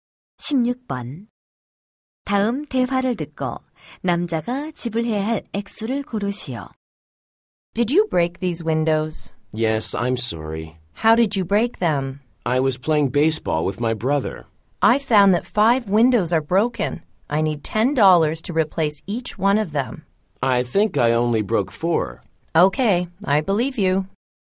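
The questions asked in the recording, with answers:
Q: 다음 대화를 듣고 남자가 지불해야 할 액수를 고르시오.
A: 40달러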